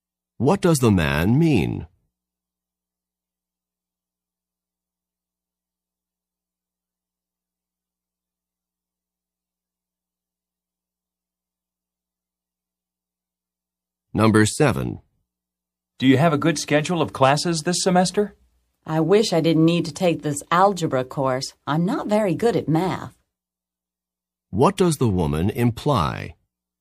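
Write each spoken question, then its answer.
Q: What does the woman imply?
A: She has to take an algebra course she doesn't want.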